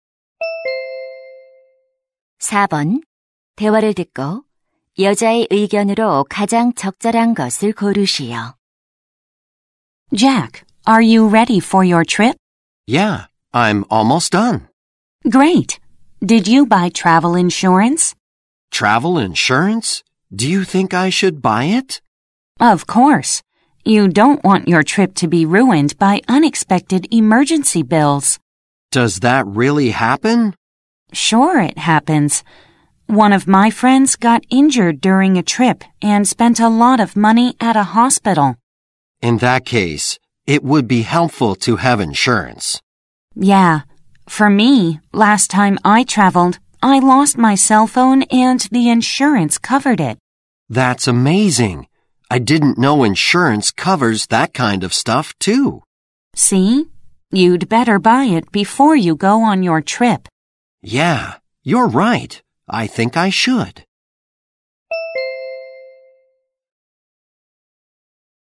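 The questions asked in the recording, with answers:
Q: 대화를 듣고 여자의 의견으로 가장 적절한 것을 고르시오.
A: 여행 전에 여행자 보험에 가입해야 한다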